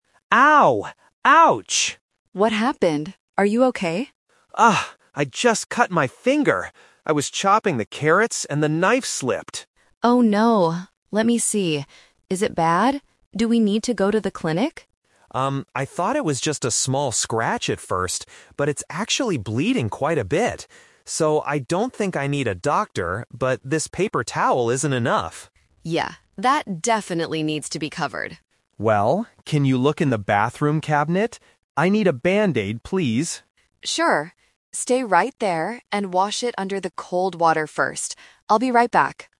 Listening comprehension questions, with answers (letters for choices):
Listen to the conversation and circle the correct answer (A, B, or C) for each question.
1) What was the man doing when the accident happened?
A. Washing the dishes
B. Cutting some vegetables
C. Looking in the cabinet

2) What does the man want the woman to get for him?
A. A paper towel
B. A band-aid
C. Some cold water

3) Why did the man decide NOT to go to the clinic?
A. Because the hospital is too far away.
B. Because he thought the paper towel was enough.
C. Because it is only a cut, not a serious injury.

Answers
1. B
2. B
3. C

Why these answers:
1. The man says he was "chopping the carrots". Carrots are vegetables. Option (C) is a trap because the cabinet is mentioned later, but he wasn't looking in it. Option (A) is not mentioned.
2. The man explicitly asks, "I need a band-aid, please." Option (A) is a trap; he mentions a paper towel, but he rejects it because it "isn't enough". Option (C) is also a trap; the woman tells him to wash his hand under cold water, but he doesn't ask her to get it.
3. He says "I don't think I need a doctor" because although it's bleeding, it is just a cut (originally thought to be a small scratch). Option (B) is a trap because he explicitly says the paper towel is not enough. Option (A) is not mentioned in the audio.

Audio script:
Man: Ow! Ouch!
Woman: What happened? Are you okay?
Man: Ah, I just cut my finger. I was chopping the carrots and the knife slipped.
Woman: Oh no, let me see. Is it bad? Do we need to go to the clinic?
Man: Um, I thought it was just a small scratch at first, but it's actually bleeding quite a bit. So, I don't think I need a doctor, but this paper towel isn't enough.
Woman: Yeah, that definitely needs to be covered.
Man: Well, can you look in the bathroom cabinet? I need a band-aid, please.
Woman: Sure. Stay right there and wash it under the cold water first. I'll be right back.